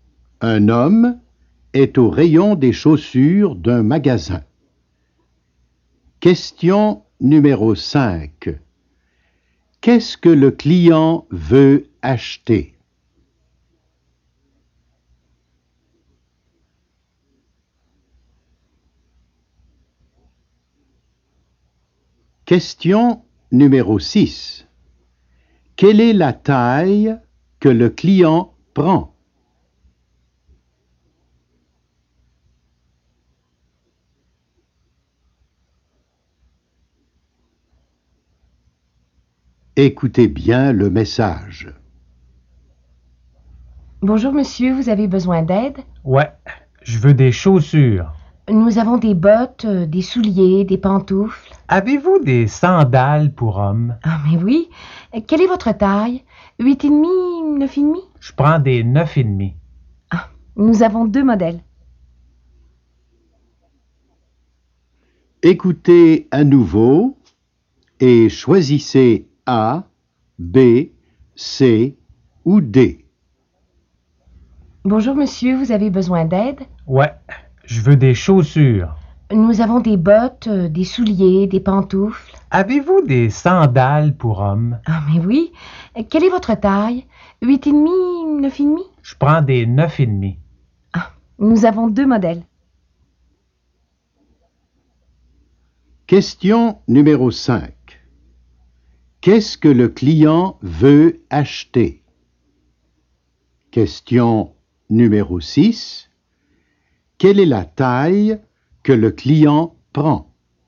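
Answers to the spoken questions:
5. des sandales pour hommes
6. 9,5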